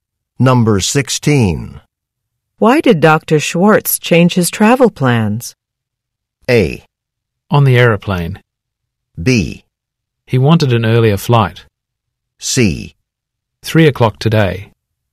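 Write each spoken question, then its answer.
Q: Why did Dr. Schwartz change his travel plans?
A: B: He wanted an earlier flight.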